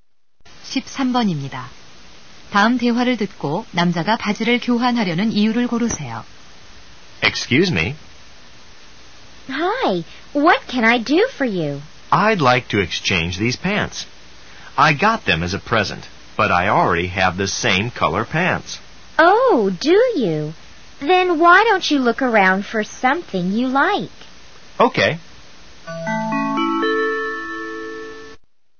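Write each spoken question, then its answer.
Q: 다음 대화를 듣고 남자가 바지를 교환하려는 이유를 고르세요.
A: 같은 색 바지가 이미 있어서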